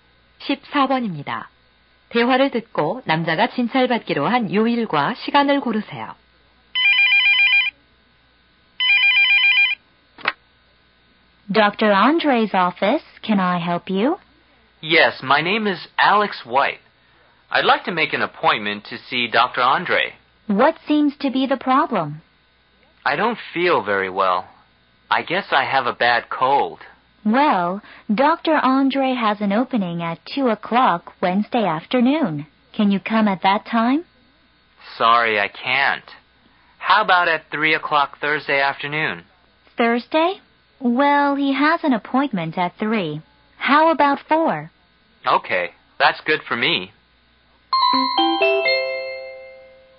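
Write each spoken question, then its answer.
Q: 대화를 듣고 남자가 진찰받기로 한 요일과 시간을 고르세요.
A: 목요일 오후 4시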